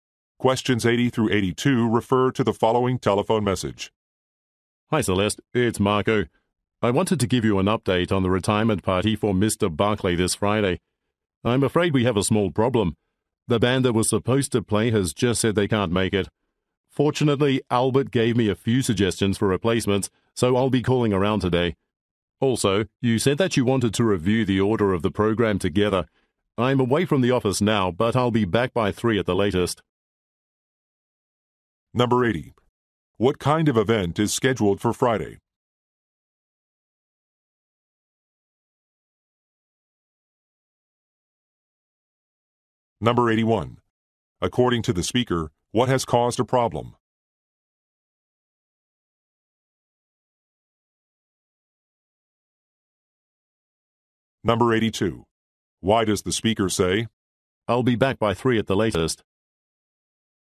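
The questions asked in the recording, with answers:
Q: What kind of event is scheduled for Friday?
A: A retirement party

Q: According to the speaker, what has caused a problem?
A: The band canceled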